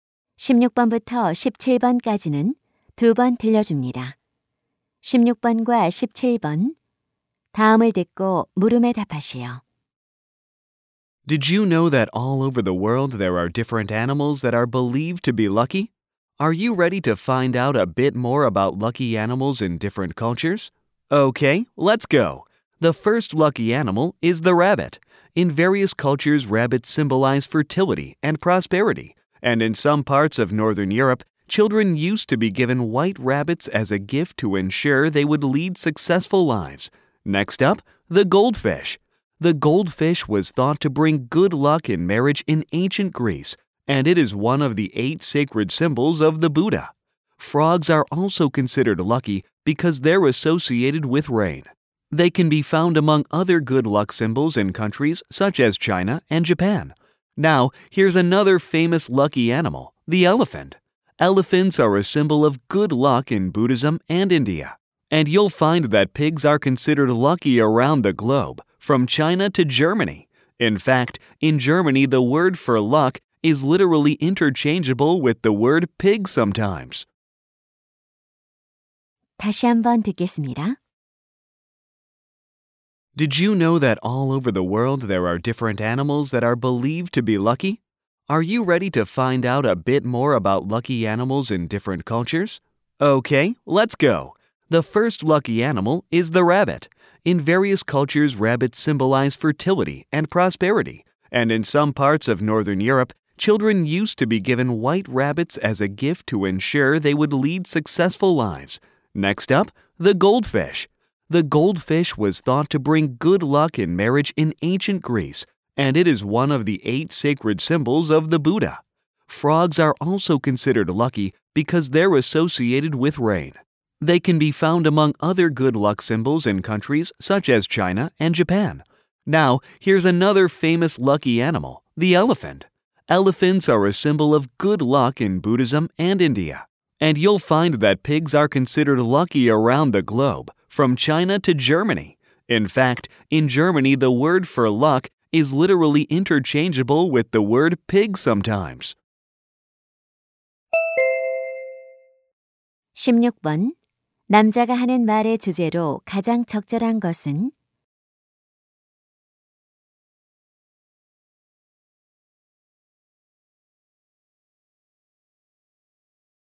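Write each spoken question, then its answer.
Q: 남자가 하는 말의 주제로 가장 적절한 것은?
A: 여러 문화에서 행운을 상징하는 동물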